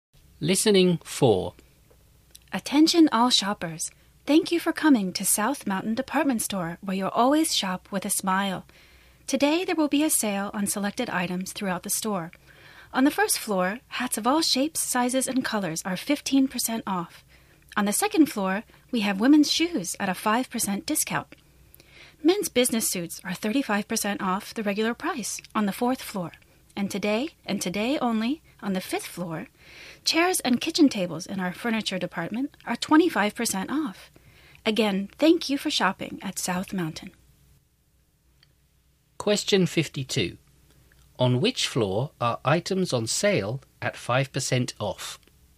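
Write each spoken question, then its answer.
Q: On which floor are items on sale at 5% off?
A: The second floor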